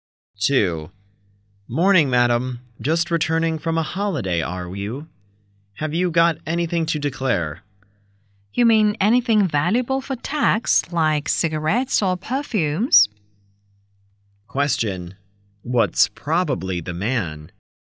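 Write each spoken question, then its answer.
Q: What's probably the man?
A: A customs officer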